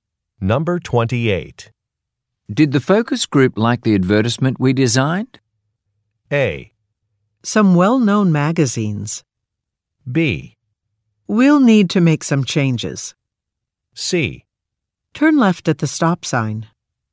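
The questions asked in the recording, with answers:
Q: Did the focus group like the advertisement we designed?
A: B: We'll need to make some changes.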